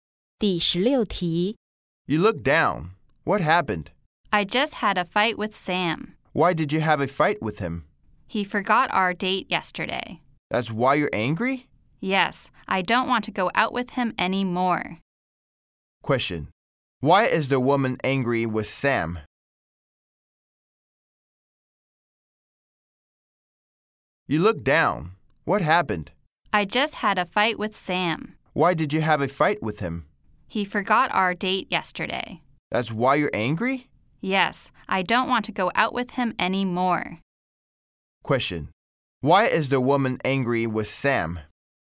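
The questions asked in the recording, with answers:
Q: Why is the woman angry with Sam?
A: He forgot their date yesterday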